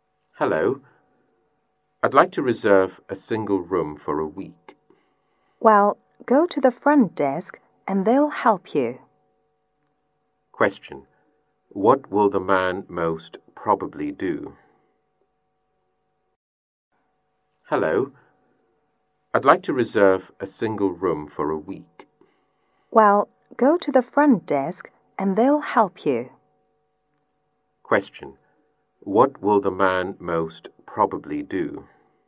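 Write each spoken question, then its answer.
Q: Question. What will the man most probably do?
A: Go to the front desk.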